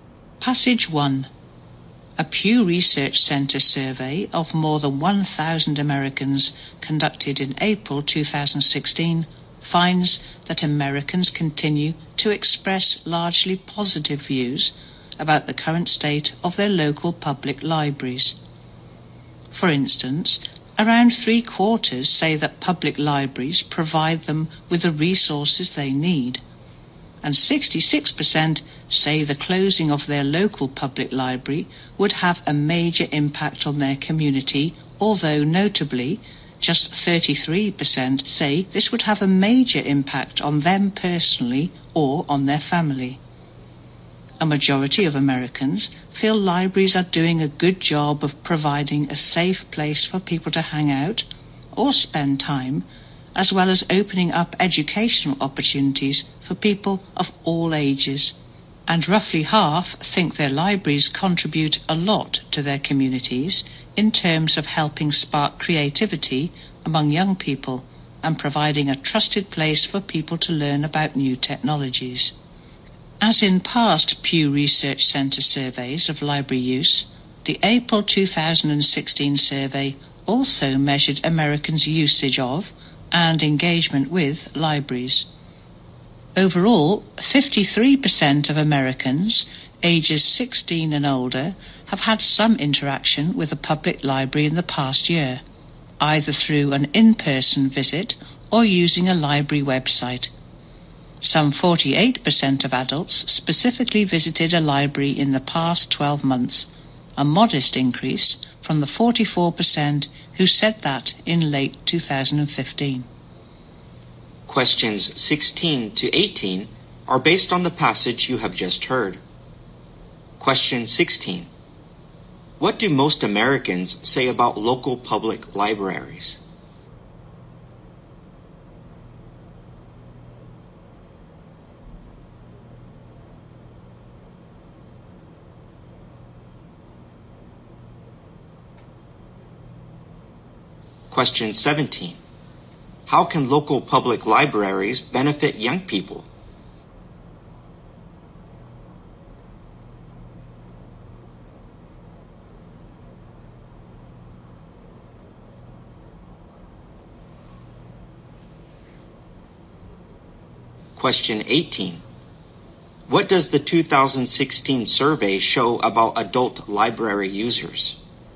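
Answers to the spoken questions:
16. They provide the resources people need
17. By helping spark their creativity
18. Their number increased a little (48%, up from 44%)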